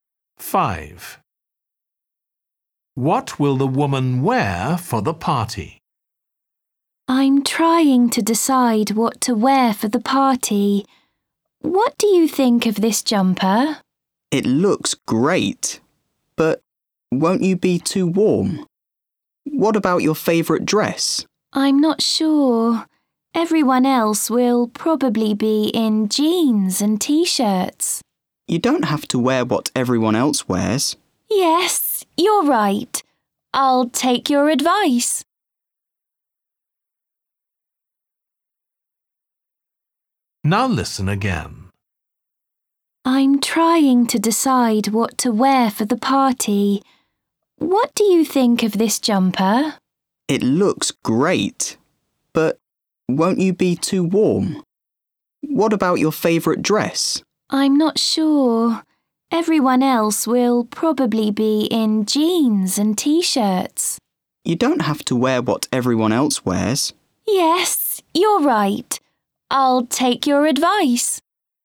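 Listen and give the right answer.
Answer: Her favourite dress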